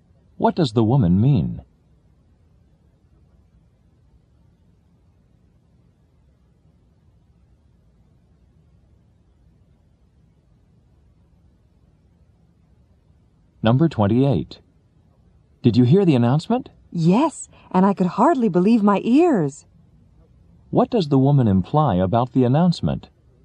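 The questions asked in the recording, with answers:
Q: What does the woman imply about the announcement?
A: It was surprising.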